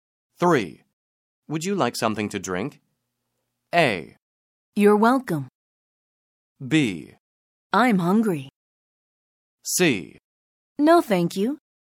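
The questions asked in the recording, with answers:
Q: Would you like something to drink?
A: C: No, thank you.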